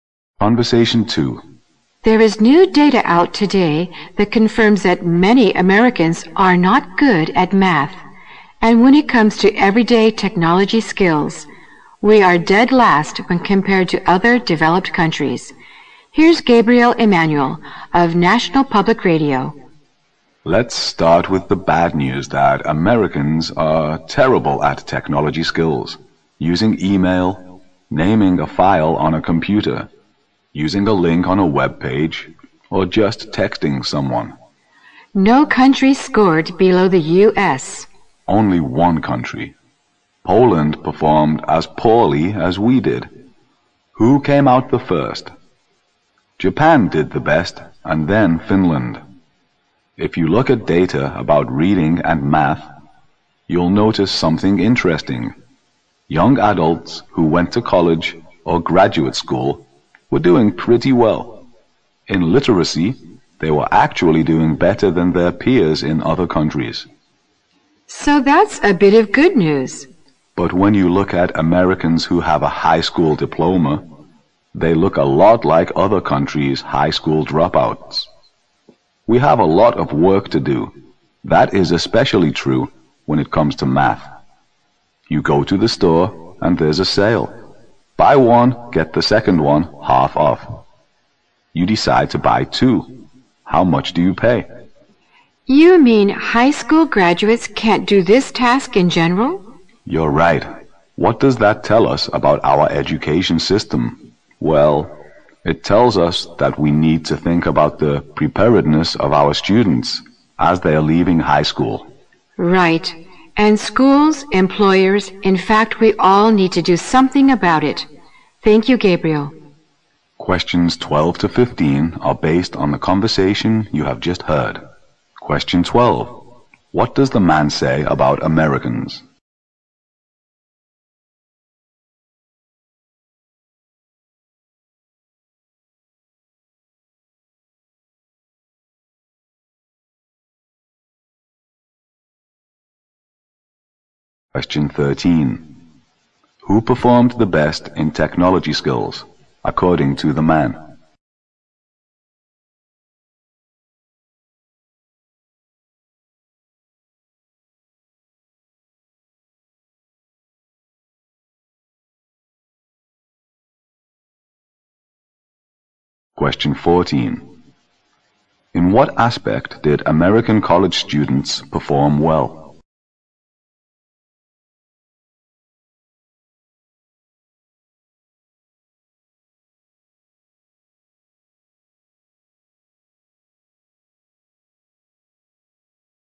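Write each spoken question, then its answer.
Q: What does the man say about Americans?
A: They are terrible at technology skills (ranked last)

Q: Who performed the best in technology skills, according to the man?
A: Japan

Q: In what aspect did American college students perform well?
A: Literacy

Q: What do we learn from the conversation about American high school education?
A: It doesn't prepare students well; graduates are like other countries' dropouts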